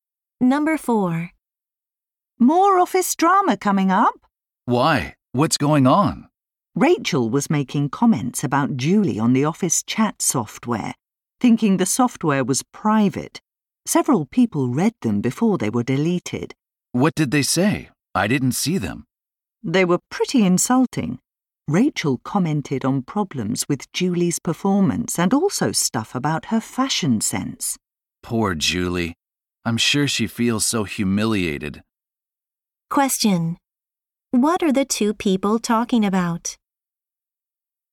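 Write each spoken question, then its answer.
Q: What are the two people talking about?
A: Insulting comments a coworker posted about Julie on the office chat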